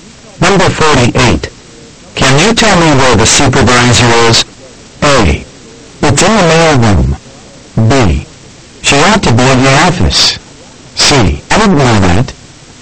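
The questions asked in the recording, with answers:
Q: Can you tell me where the supervisor is?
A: B: She ought to be in the office.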